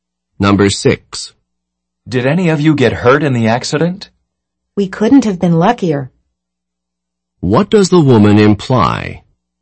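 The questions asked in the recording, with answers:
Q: What does the woman imply?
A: No one was hurt; they were very lucky.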